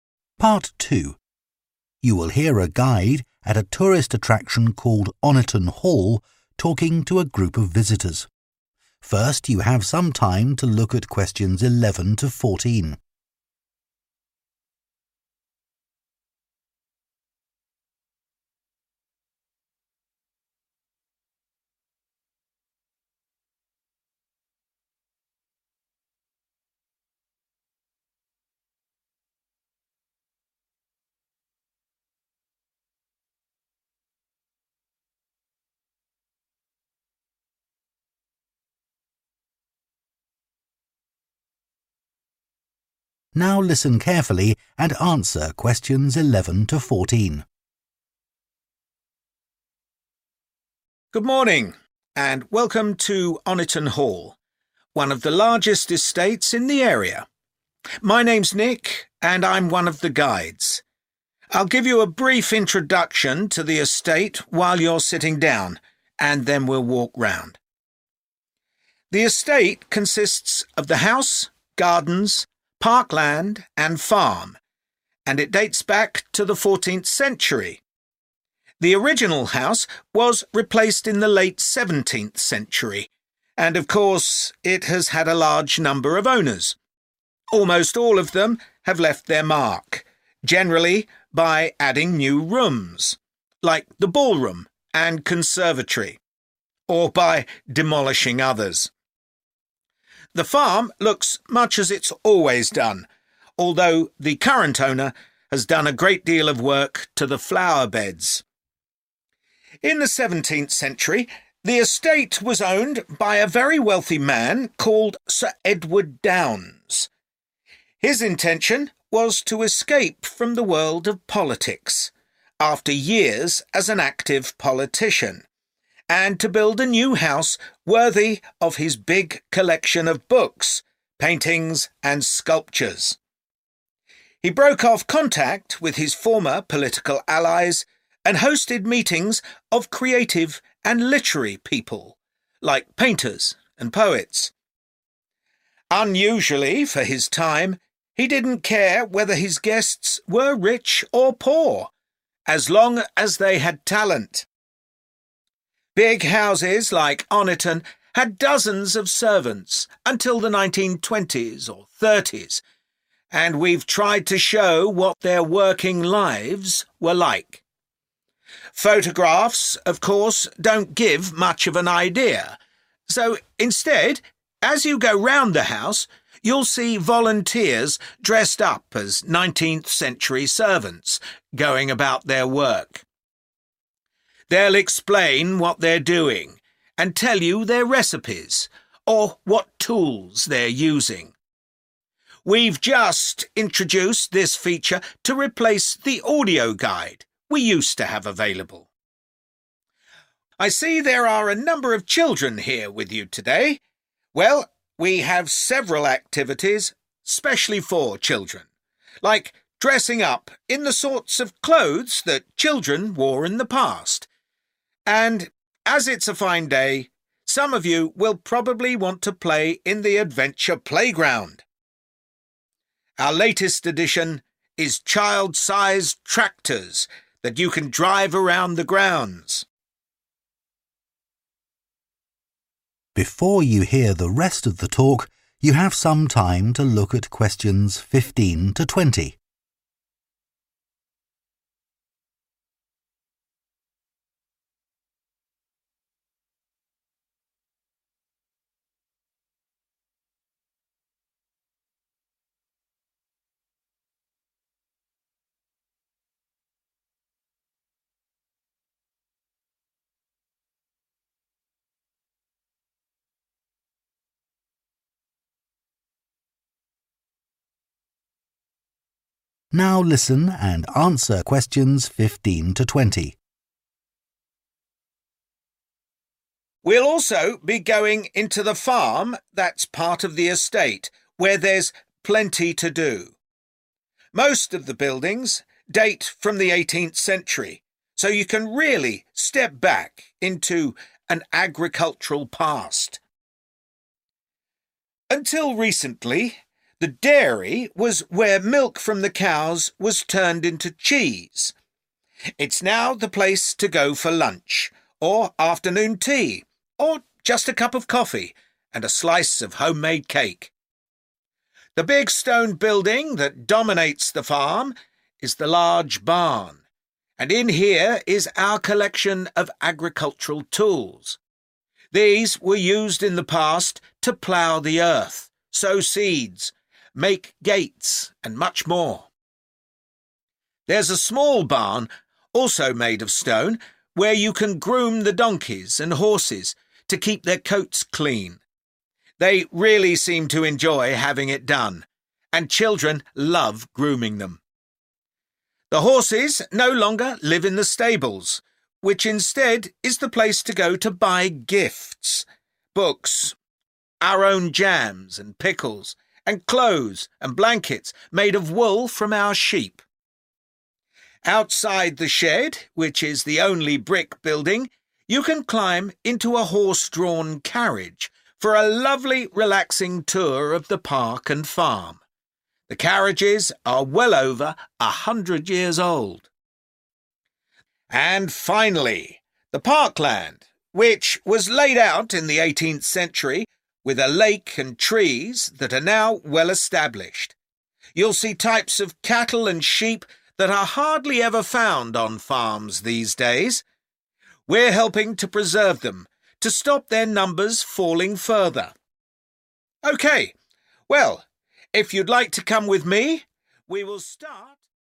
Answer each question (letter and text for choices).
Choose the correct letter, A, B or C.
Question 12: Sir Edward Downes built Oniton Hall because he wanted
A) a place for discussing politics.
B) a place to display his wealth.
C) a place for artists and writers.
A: C) a place for artists and writers.

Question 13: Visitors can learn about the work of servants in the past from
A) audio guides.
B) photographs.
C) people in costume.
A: C) people in costume.

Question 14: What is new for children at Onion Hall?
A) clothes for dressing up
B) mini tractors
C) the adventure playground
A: B) mini tractors

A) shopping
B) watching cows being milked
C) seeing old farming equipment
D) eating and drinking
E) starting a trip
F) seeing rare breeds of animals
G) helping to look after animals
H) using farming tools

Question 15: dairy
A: D) eating and drinking

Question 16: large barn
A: C) seeing old farming equipment

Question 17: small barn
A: G) helping to look after animals

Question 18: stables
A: A) shopping

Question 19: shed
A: E) starting a trip

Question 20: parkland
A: F) seeing rare breeds of animals